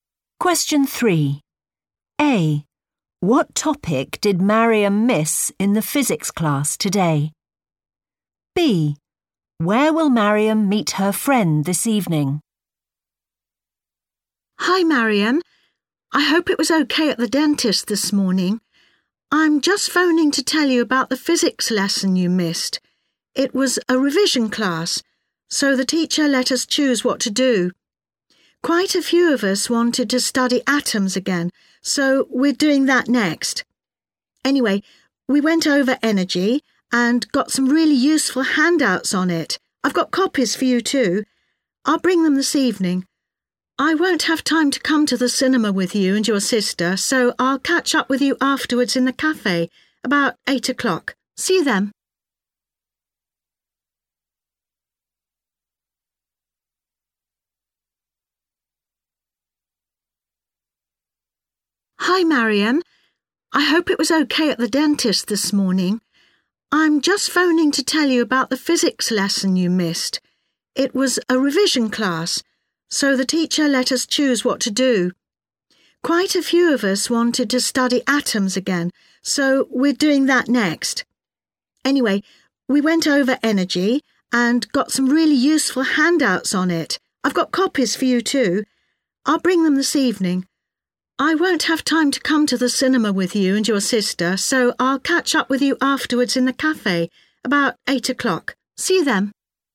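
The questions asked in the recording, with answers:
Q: What topic did Mariam miss in the physics class today?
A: energy

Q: Where will Mariam meet her friend this evening?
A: in the cafe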